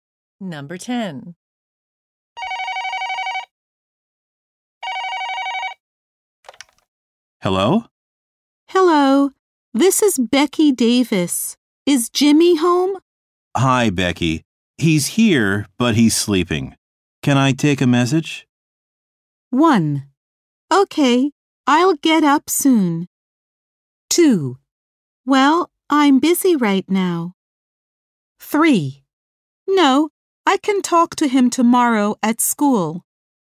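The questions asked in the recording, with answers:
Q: Can I take a message?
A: 3: No, I can talk to him tomorrow at school.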